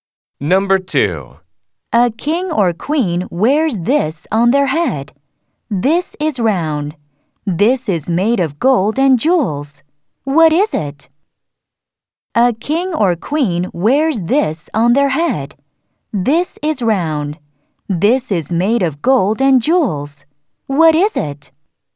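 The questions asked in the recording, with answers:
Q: What is it?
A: a crown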